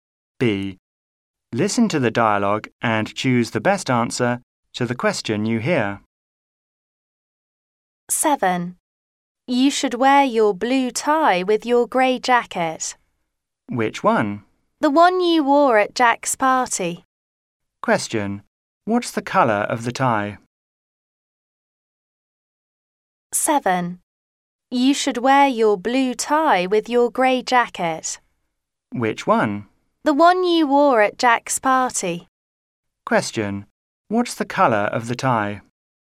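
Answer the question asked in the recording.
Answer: Blue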